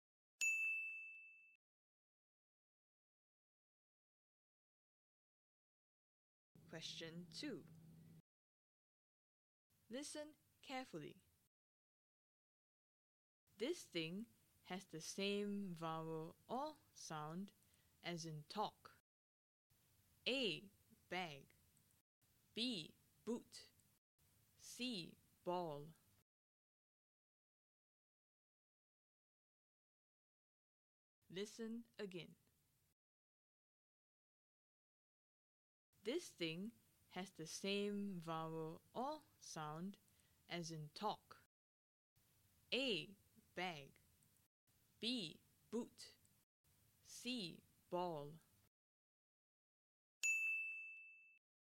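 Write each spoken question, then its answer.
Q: This thing has the same vowel or sound as in talk.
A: C: Ball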